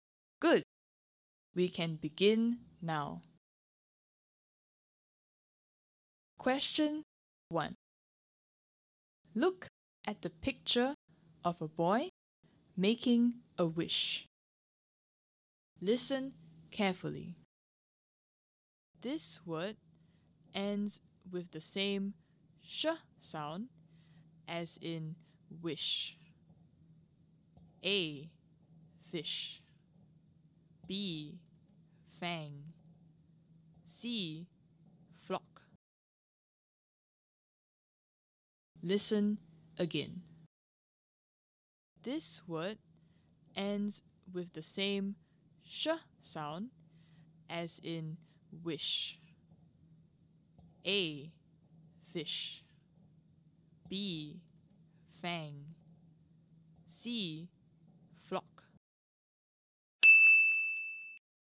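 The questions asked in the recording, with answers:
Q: This word ends with the same sh sound as in wish.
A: A: fish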